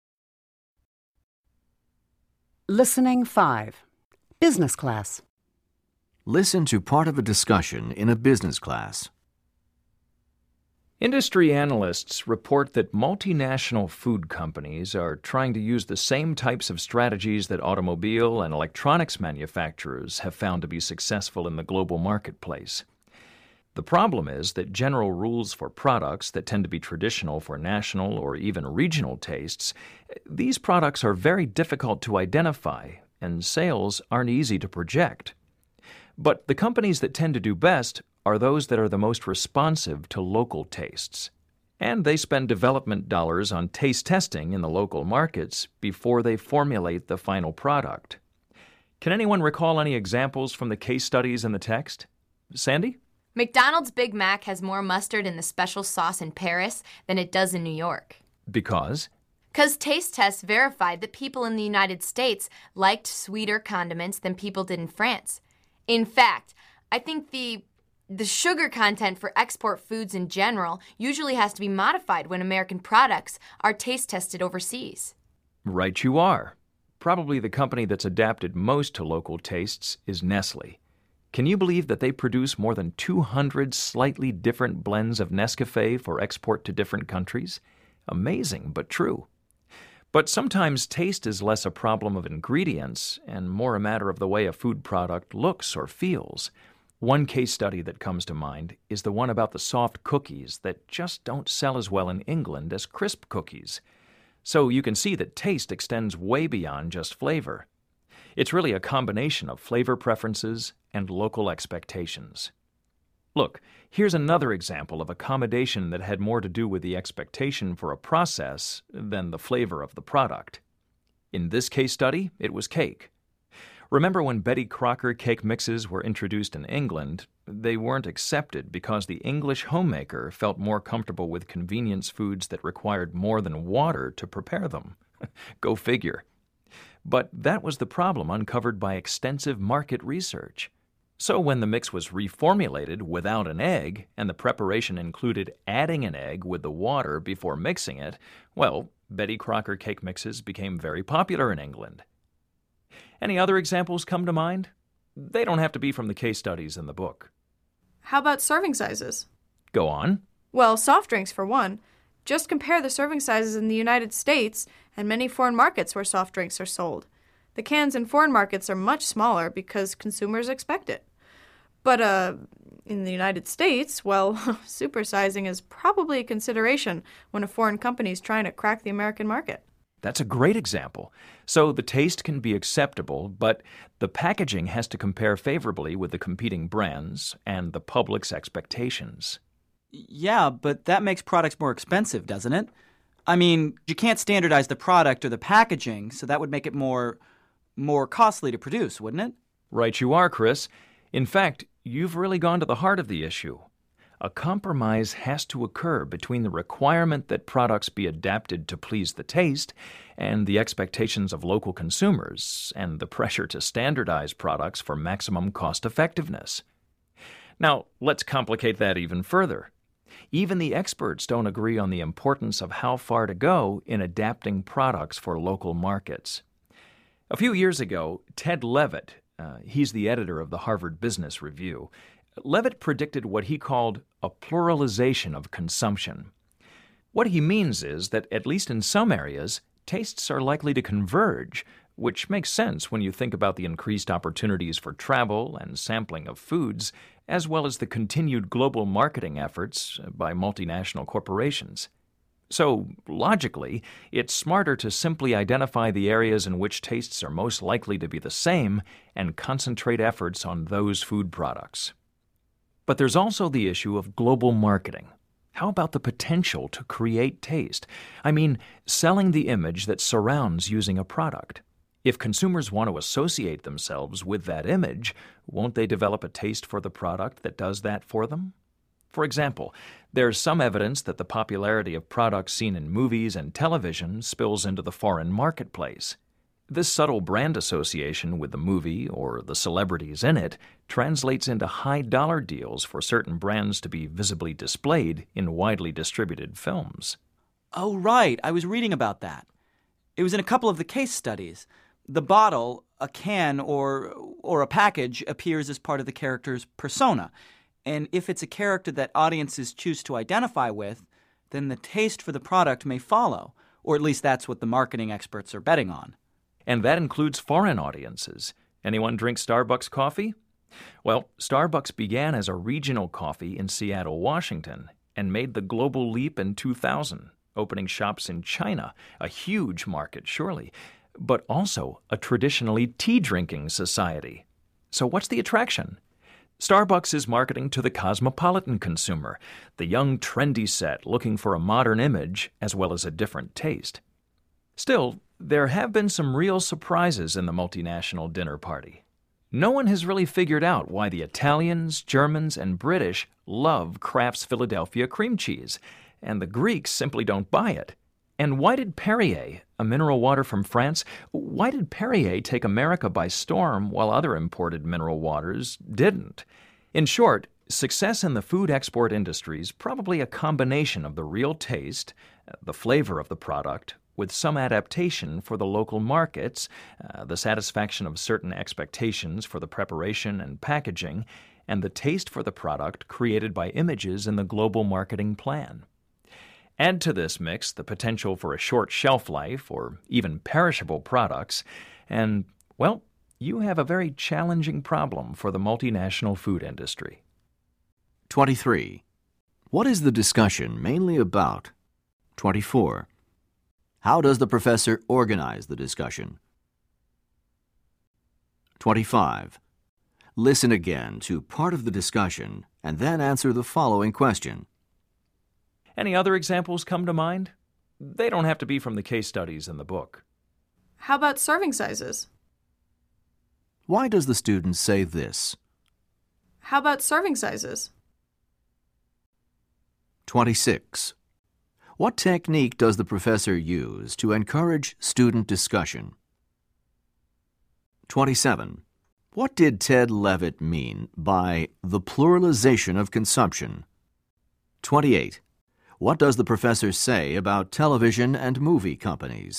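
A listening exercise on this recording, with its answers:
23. What is the discussion mainly about?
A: Global marketing of food products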